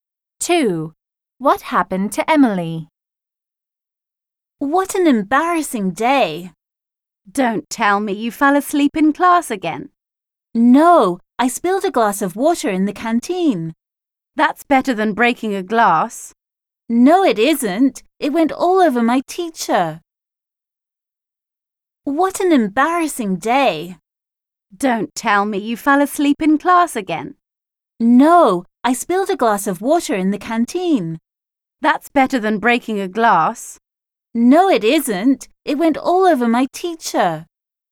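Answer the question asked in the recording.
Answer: She spilled a glass of water over her teacher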